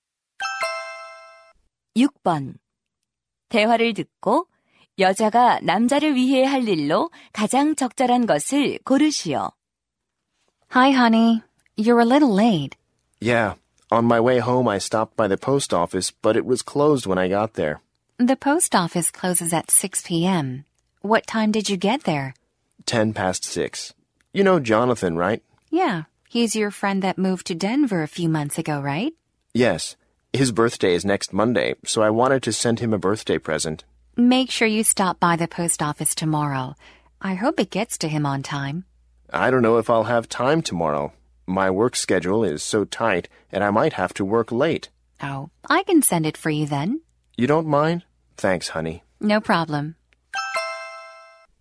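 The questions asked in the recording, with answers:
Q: 대화를 듣고 여자가 남자를 위해 할 일로 가장 적절한 것을 고르시오.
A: 생일 선물 소포 부치기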